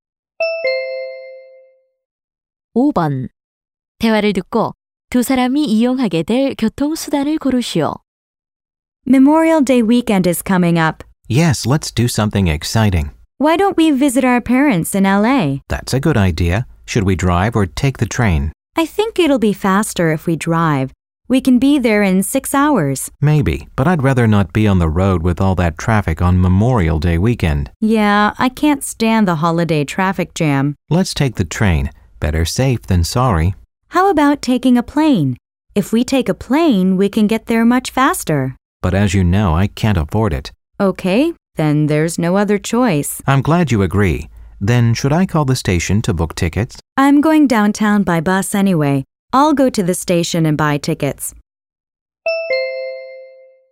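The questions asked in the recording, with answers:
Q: 대화를 듣고 두 사람이 이용하게 될 교통수단을 고르시오.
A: 기차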